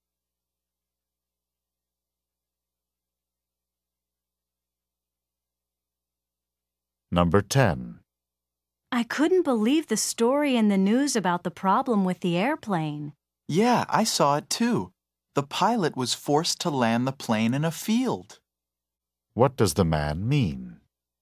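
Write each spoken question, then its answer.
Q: What does the man mean?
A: He also saw the story; the pilot had to land in a field.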